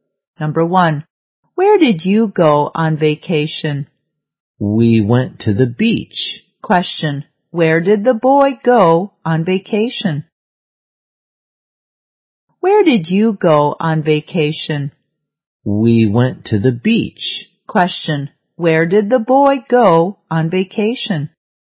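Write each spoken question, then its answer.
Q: where did the boy go on vacation?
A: To the beach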